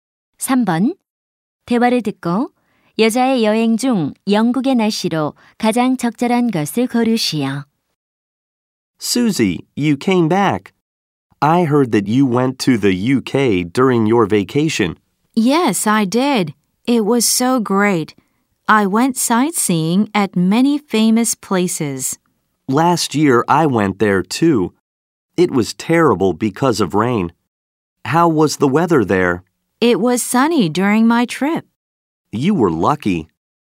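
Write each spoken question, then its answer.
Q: 대화를 듣고 여자의 여행 중 영국의 날씨로 가장 적절한 것을 고르시오.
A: 맑음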